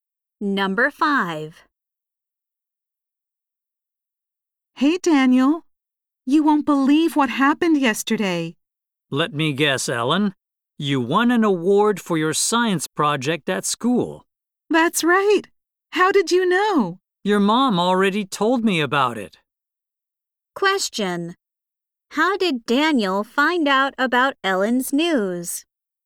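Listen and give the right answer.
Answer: Ellen's mom told him.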